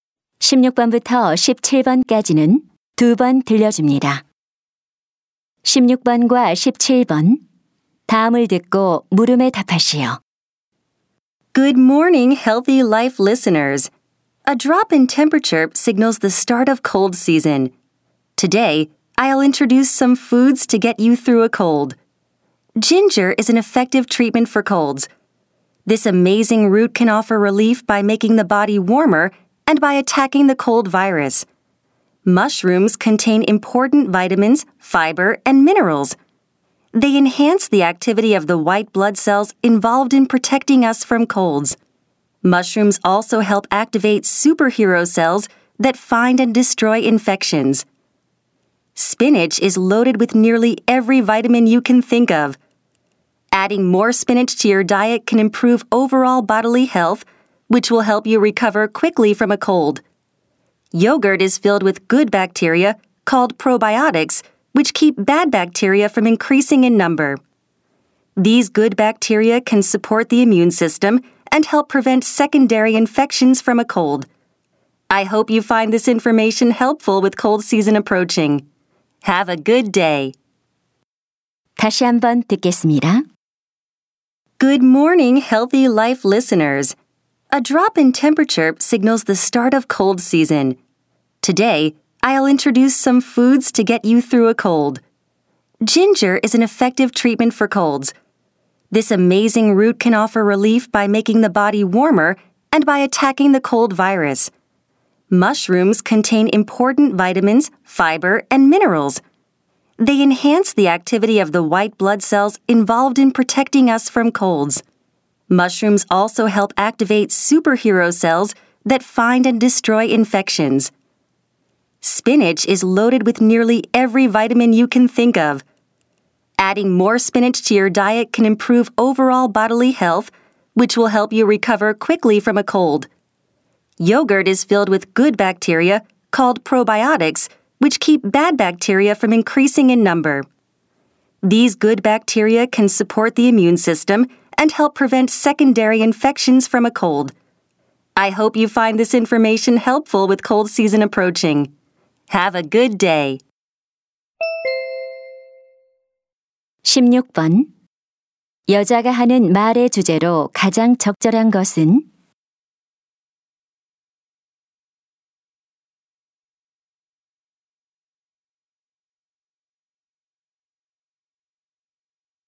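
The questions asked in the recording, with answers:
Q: 여자가 하는 말의 주제로 가장 적절한 것은?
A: 감기 극복에 도움이 되는 음식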